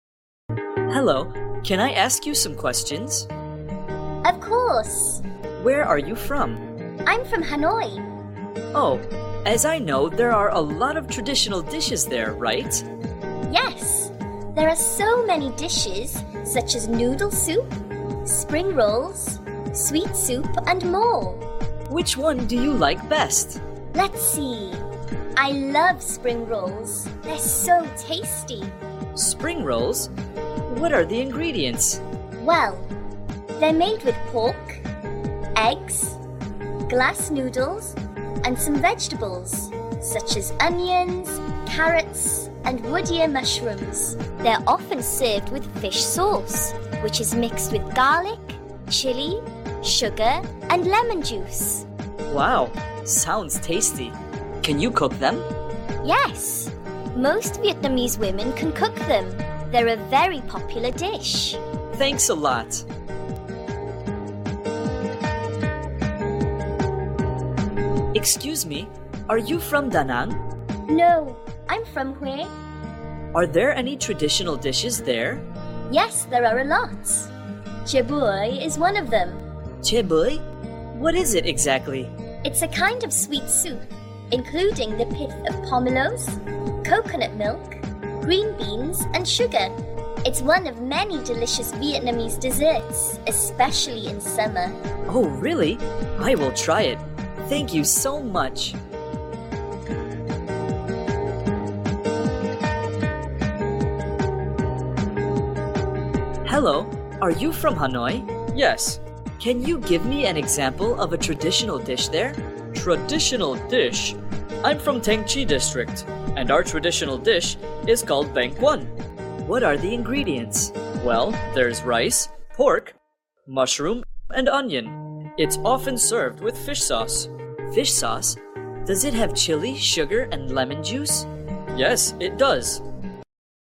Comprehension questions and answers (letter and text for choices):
Task: Match the dishes with their descriptions.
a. A sweet soup made from pomelo, coconut milk, and beans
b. Rice rolls with pork and mushroom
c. Pork, eggs, glass noodles, and vegetables with fish sauce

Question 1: Spring rolls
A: c. Pork, eggs, glass noodles, and vegetables with fish sauce

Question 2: Chè bưởi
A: a. A sweet soup made from pomelo, coconut milk, and beans

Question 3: Bánh cuốn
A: b. Rice rolls with pork and mushroom

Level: lớp 7